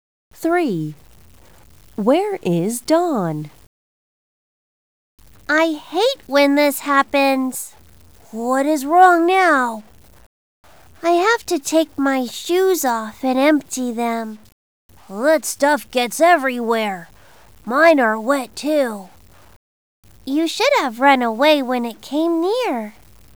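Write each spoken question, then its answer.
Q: Where is Dawn?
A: At the beach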